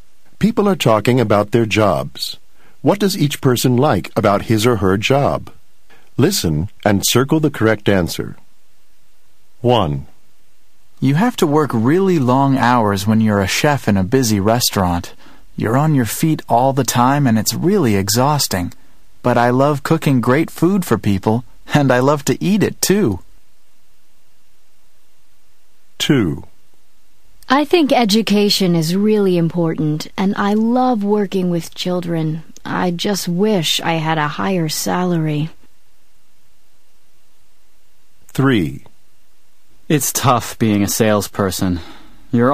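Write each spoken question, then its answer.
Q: What does each person like about his or her job?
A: Cooking great food for people (and eating it)

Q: What does each person like about his or her job?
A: Working with children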